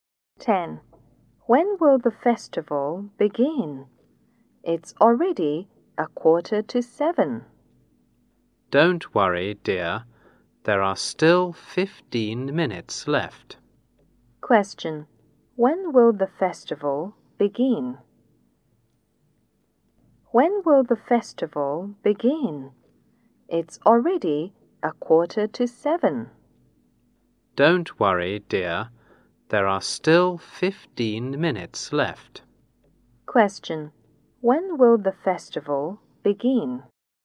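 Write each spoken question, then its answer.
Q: When will the festival begin?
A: At 7:30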